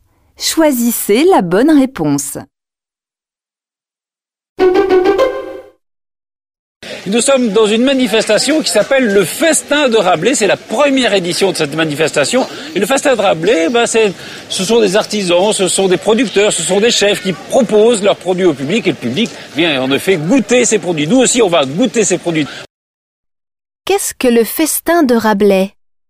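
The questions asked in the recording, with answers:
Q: Qu'est-ce que le Festin de Rabelais ?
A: Une manifestation (première édition) où des artisans, producteurs et chefs proposent leurs produits à goûter au public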